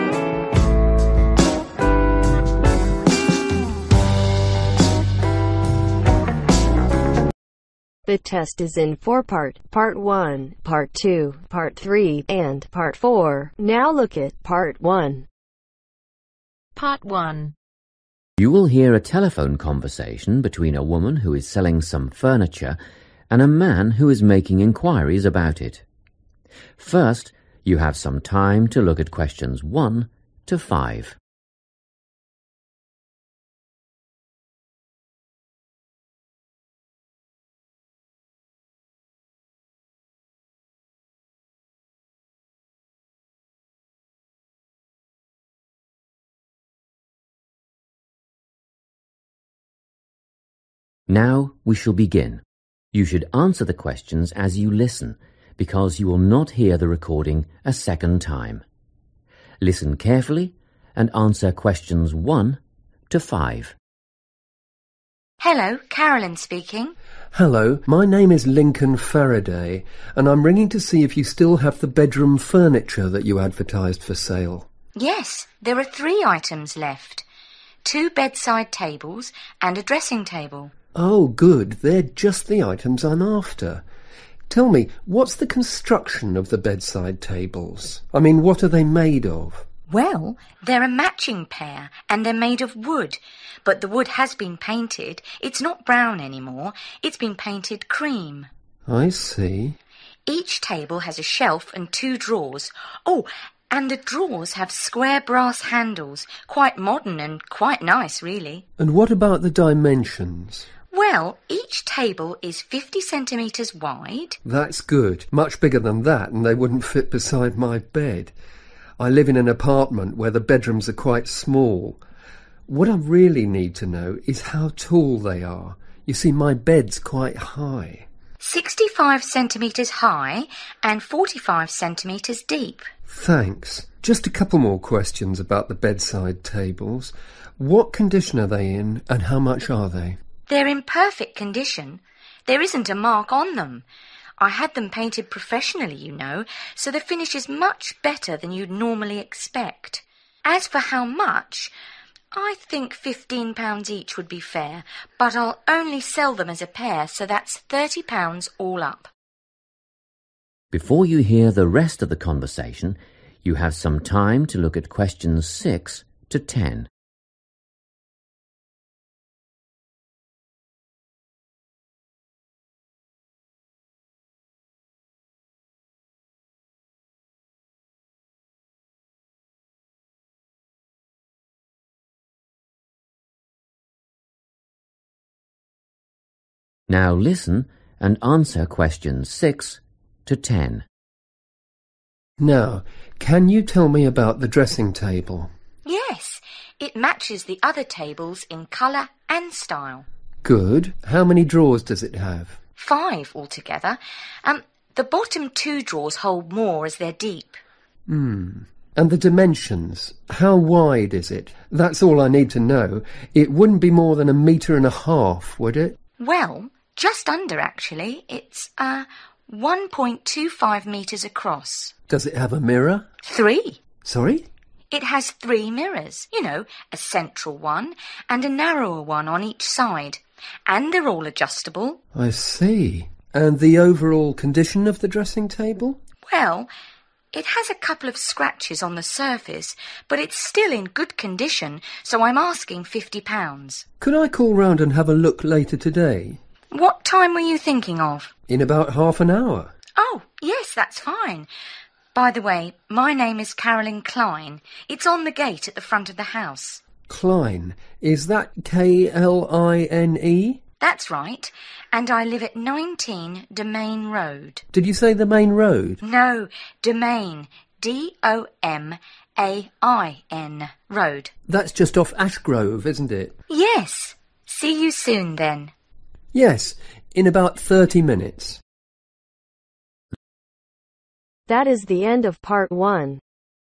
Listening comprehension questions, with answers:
Complete the notes below. Write ONE WORD AND/OR A NUMBER for each answer.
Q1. Colour: (1)............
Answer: Cream

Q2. Drawers: two (in each table) handles made of (2)............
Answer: Brass

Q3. Height: (3)............ cm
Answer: 65

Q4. Condition: (4)............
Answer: Perfect

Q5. Price: (5)............ (for both)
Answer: £30

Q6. Drawers: five (two are (6)............ )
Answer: Deep

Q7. Width: (7)............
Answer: 1.25m

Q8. Mirrors: three: one large, two small (all (8)............ )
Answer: Adjustable

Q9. Price: (9)............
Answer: £50

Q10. Address: 19 (10)............ Road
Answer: Domain